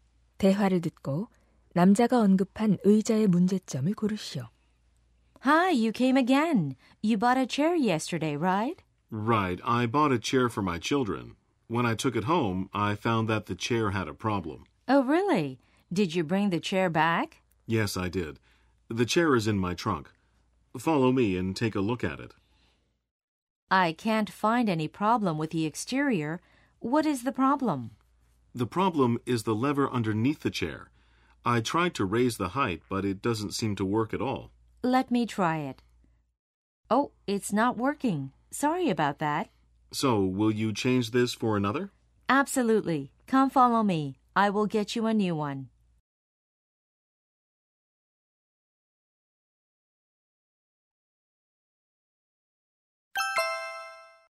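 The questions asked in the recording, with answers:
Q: 대화를 듣고 남자가 언급한 의자의 문제점을 고르시오.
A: 의자 아래 높이 조절 레버가 작동하지 않는다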